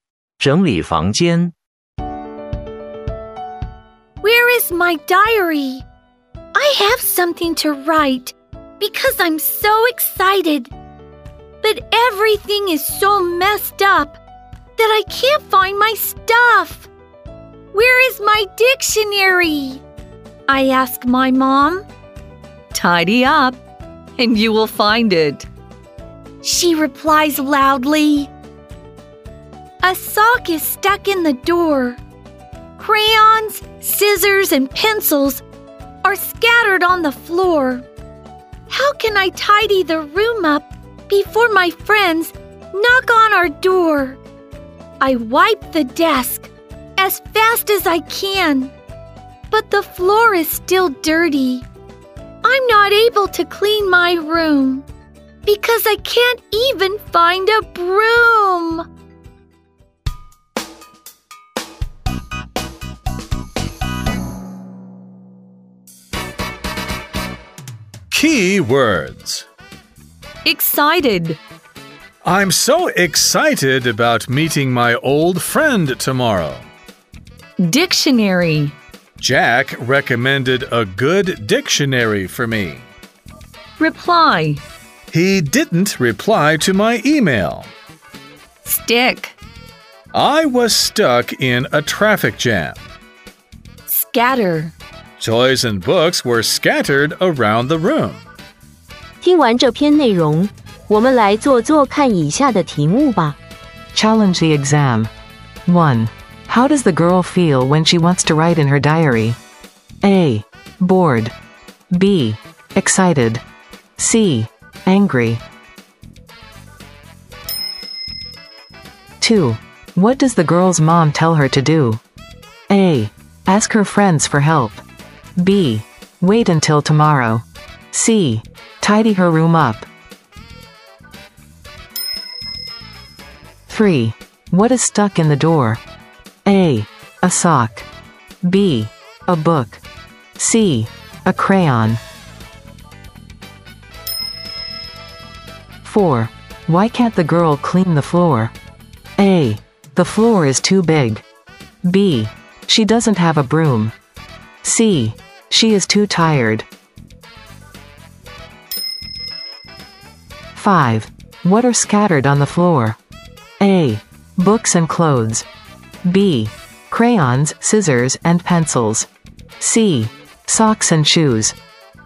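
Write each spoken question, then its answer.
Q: How does the girl feel when she wants to write in her diary?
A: B: Excited.

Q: What does the girl's mom tell her to do?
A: C: Tidy her room up.

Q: What is stuck in the door?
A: A: A sock.

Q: Why can't the girl clean the floor?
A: B: She doesn't have a broom.

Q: What are scattered on the floor?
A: B: Crayons, scissors, and pencils.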